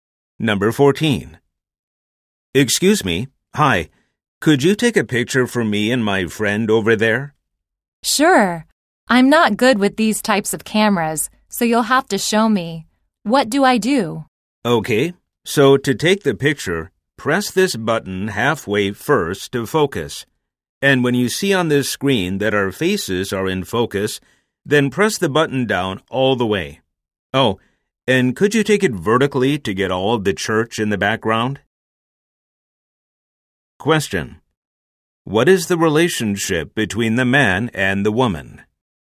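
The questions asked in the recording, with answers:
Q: What is the relationship between the man and the woman?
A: They are strangers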